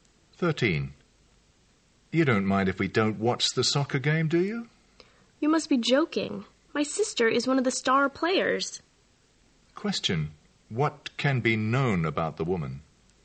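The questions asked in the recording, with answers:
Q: What can be known about the woman?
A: She wants to watch the game because her sister plays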